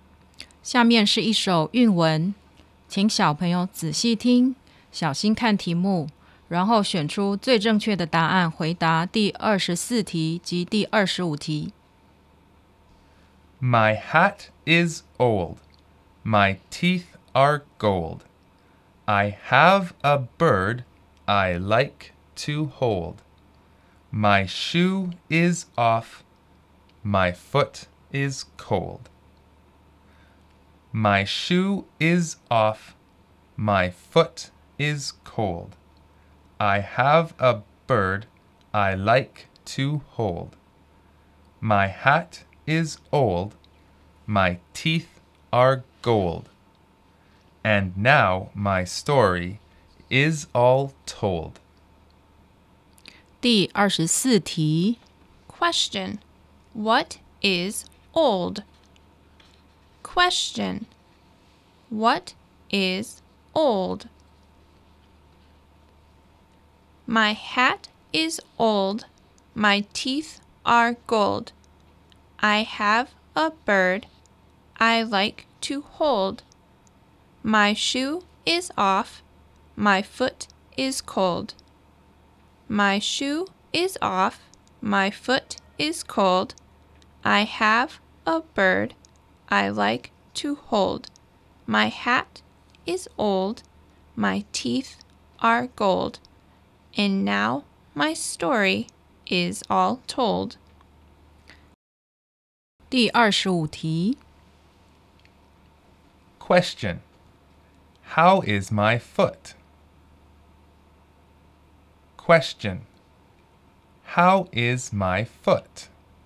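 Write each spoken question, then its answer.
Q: What is old?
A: My hat

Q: How is my foot?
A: It's cold.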